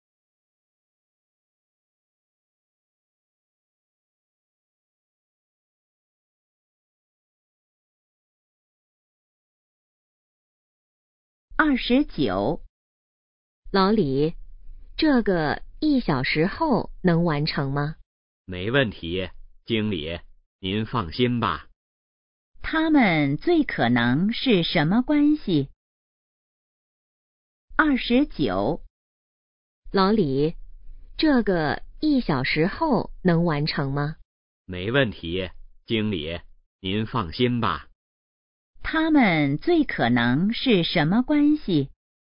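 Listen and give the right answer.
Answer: 同事(经理和职员)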